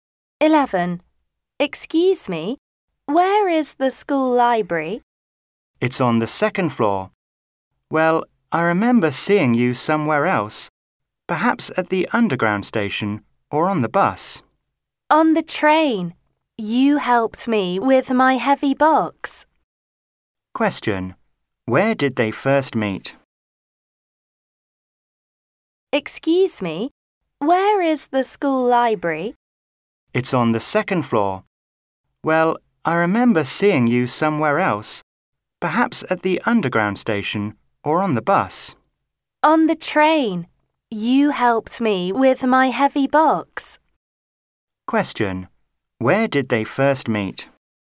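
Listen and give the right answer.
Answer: On the train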